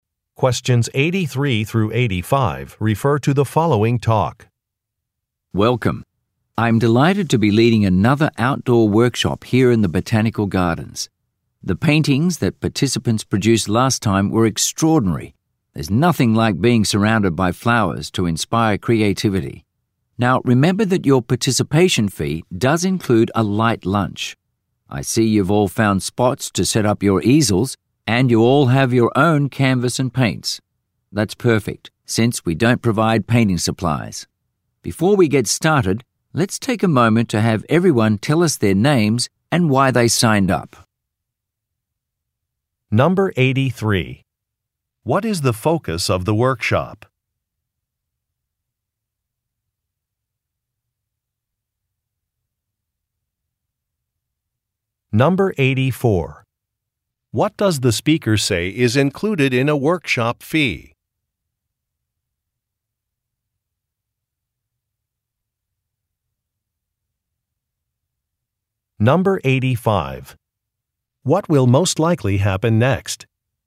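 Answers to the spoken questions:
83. Painting outdoors (painting flowers in the Botanical Gardens)
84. A light lunch
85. Participants will introduce themselves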